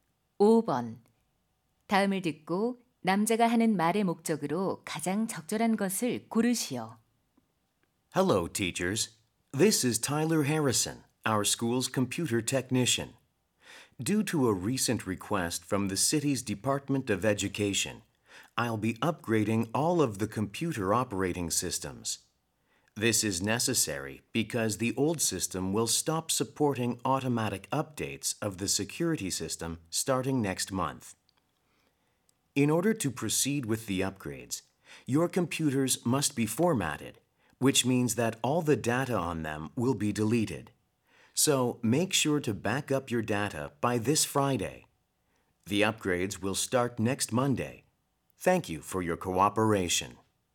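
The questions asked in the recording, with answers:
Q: 다음을 듣고 남자가 하는 말의 목적으로 가장 적절한 것을 고르시오.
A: 컴퓨터 운영체제 업그레이드 전에 데이터를 백업하도록 요청하려고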